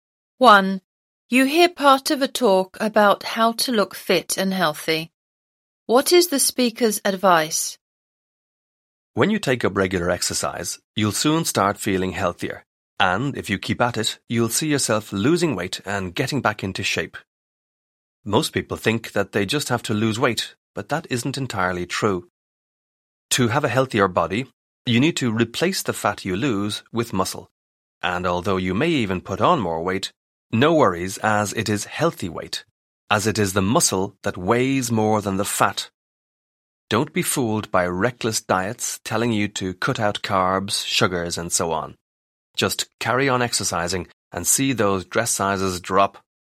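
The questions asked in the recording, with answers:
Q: What is the speaker's advice?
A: Keep exercising and don't follow extreme diets; build muscle to replace fat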